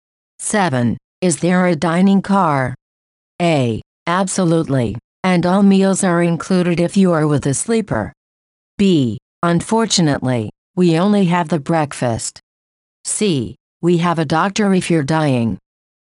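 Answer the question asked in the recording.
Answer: A: Absolutely, and all meals are included if you are with a sleeper.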